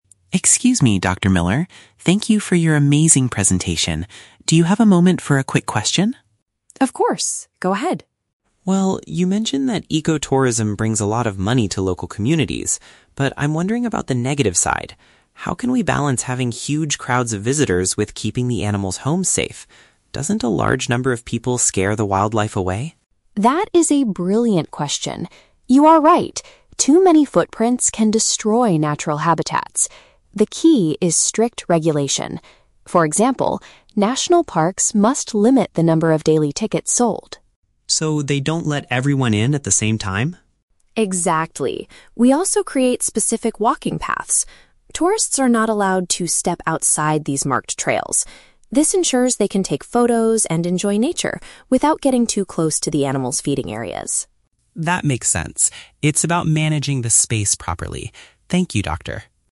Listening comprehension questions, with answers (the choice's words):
Listen to a student asking a question after a seminar presentation. Choose the correct answer (A, B, or C) for each question.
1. What is the student's main concern about ecotourism?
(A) The local communities are not making enough money.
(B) Big groups of travelers might damage where animals live.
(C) The ticket prices are too high for regular visitors.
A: Big groups of travelers might damage where animals live.

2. According to Dr. Miller, how do national parks control the crowds?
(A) By restricting how many people can enter each day.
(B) By increasing the price of daily entrance tickets.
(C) By refusing to sell tickets to very large groups.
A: By restricting how many people can enter each day.

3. Why do the parks use specific walking paths?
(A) To help tourists take better photographs of the forest.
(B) To make sure nobody gets lost in the wild.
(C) To prevent visitors from disturbing the animals' food sources.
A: To prevent visitors from disturbing the animals' food sources.

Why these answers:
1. Leo asks how to balance having "huge crowds of visitors" with "keeping the animals' homes safe." This is paraphrased as "big groups of travelers might damage where animals live."
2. Dr. Miller states that national parks must "limit the number of daily tickets sold." This means they restrict how many people can enter.
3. Dr. Miller explains that marked trails ensure tourists do not get "too close to the animals' feeding areas." "Feeding areas" is paraphrased as "food sources."

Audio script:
Leo: Excuse me, Dr. Miller. Thank you for your amazing presentation. Do you have a moment for a quick question?
Dr. Miller: Of course. Go ahead.
Leo: Well, you mentioned that ecotourism brings a lot of money to local communities. But I'm wondering about the negative side. How can we balance having huge crowds of visitors with keeping the animals' homes safe? Doesn't a large number of people scare the wildlife away?
Dr. Miller: That is a brilliant question. You are right; too many footprints can destroy natural habitats. The key is strict regulation. For example, national parks must limit the number of daily tickets sold.
Leo: So, they don't let everyone in at the same time?
Dr. Miller: Exactly. We also create specific walking paths. Tourists are not allowed to step outside these marked trails. This ensures they can take photos and enjoy nature without getting too close to the animals' feeding areas.